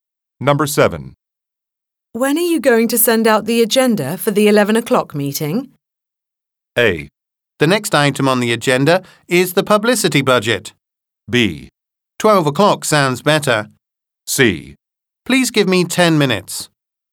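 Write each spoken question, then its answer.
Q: When are you going to send out the agenda for the 11 o'clock meeting?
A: C: Please give me 10 minutes.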